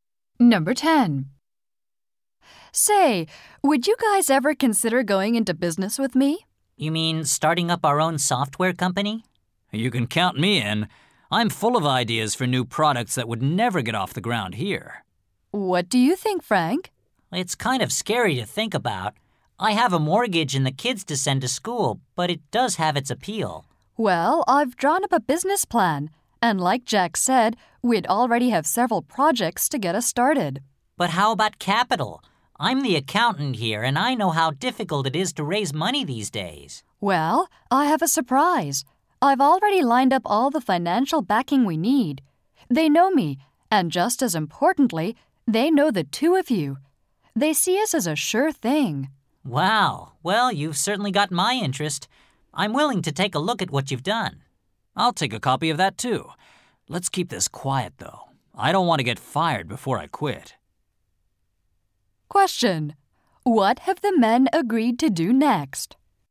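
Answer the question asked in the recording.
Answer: Look at the business plan.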